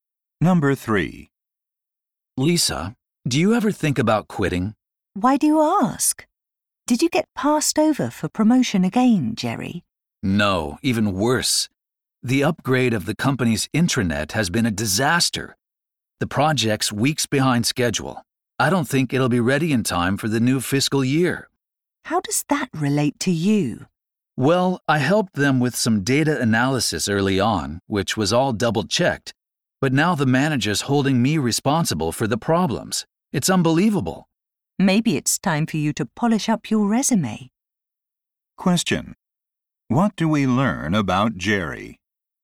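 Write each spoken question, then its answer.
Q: What do we learn about Jerry?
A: His manager is unfairly blaming him for the intranet project's problems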